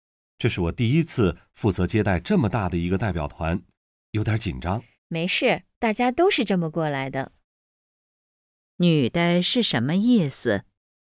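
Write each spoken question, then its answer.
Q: 女的是什么意思?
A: 不用紧张,大家都是这样过来的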